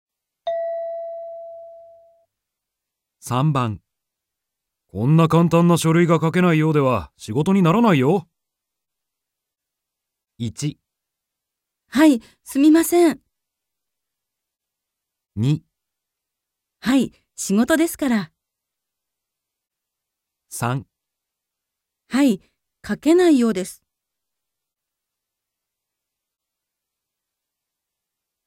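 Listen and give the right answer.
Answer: 1. はい、すみません。

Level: N2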